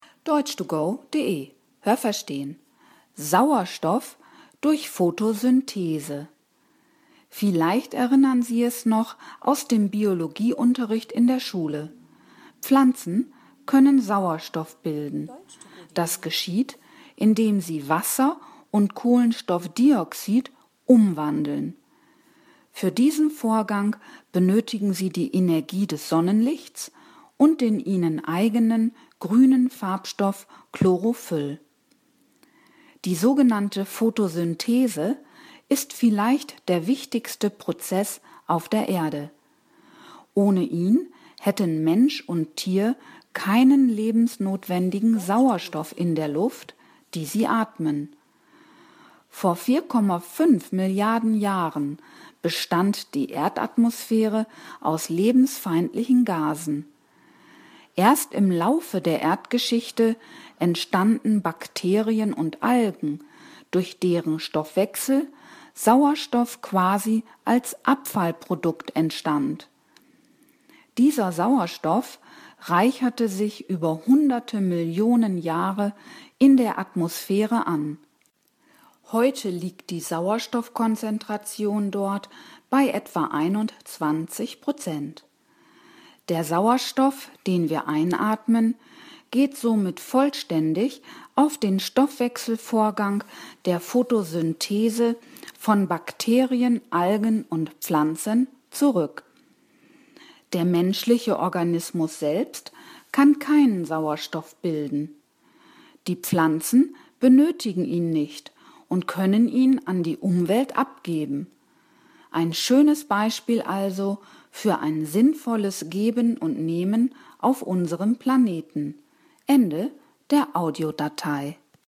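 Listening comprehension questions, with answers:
Haben Sie das gehört? Stimmt diese Aussage?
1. Pflanzen wandeln Wasser und Kohlenstoffdioxid (CO 2) in Sauerstoff (O 2) um.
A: richtig

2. Den Vorgang der Photosynthese können Pflanzen ohne Einwirkung von Sonnenstrahlen leisten.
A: falsch

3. Ohne Photosynthese gäbe es keinen Sauerstoff.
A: richtig

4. Vor 4,5 Millionen Jahren bestand die Erdatmosphäre aus lebensfeindlichen Gasen.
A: falsch

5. Heute besteht die Atmosphäre fast vollständig aus Sauerstoff.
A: falsch

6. Neben Pflanzen bilden ebenso Bakterien und Algen Sauerstoff.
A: richtig

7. Auch der Mensch kann durch seinen Stoffwechsel Sauerstoff erzeugen.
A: falsch

Welche Präposition passt?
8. Vielleicht erinnern Sie es noch _____ dem Biologieunterricht in der Schule?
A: aus

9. Die Photosynthese ist vielleicht der wichtigste Prozess _____ der Erde.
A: auf

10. Es entwickelten sich Bakterien und Algen _____ , deren Stoffwechsel Sauerstoff entstand.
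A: durch

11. Sauerstoff reicherte sich _____ hunderte Millionen Jahre in der Atmosphäre an.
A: über

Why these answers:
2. Sie brauchen die Energie des Sonnenlichts dazu.
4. Das war vor 4,5 Milliarden Jahren.
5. Die Sauerstoffkonzentration dort liegt bei 21 %.
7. Der menschliche Körper kann dies nicht.

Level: Hörtexte C (schwer)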